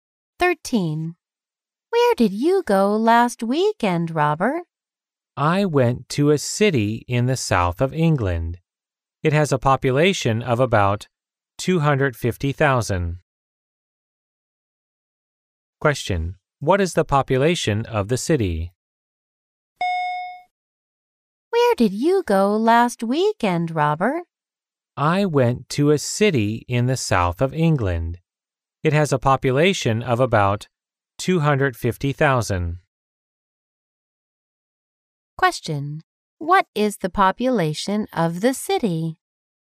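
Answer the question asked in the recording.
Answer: About 250,000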